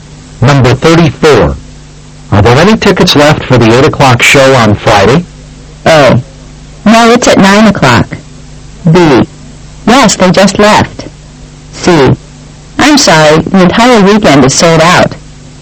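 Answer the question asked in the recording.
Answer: C: I'm sorry, the entire weekend is sold out.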